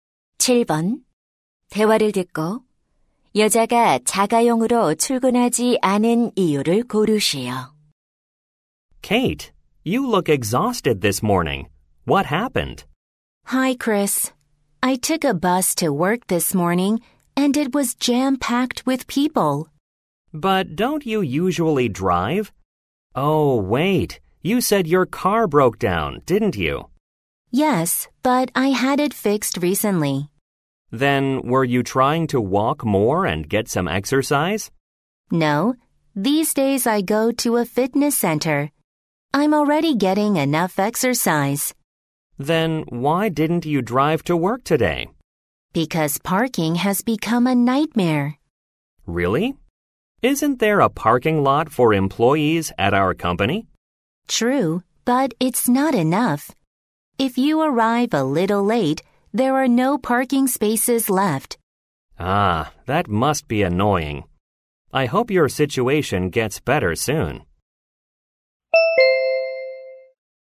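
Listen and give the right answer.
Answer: 주차 공간이 부족해서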